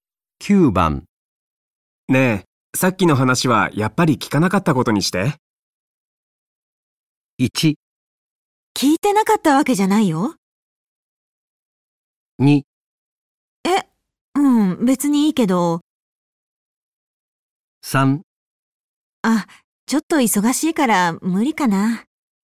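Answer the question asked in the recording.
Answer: 2: え、うん、別にいいけど。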